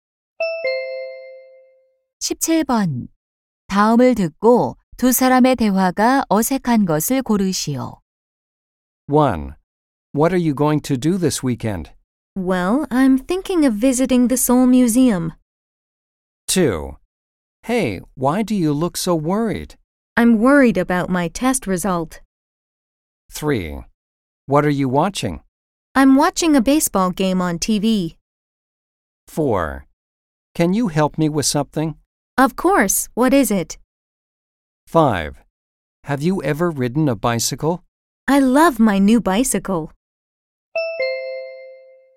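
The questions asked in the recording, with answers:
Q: 다음을 듣고 두 사람의 대화가 어색한 것을 고르시오.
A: 5: Have you ever ridden a bicycle? / I love my new bicycle.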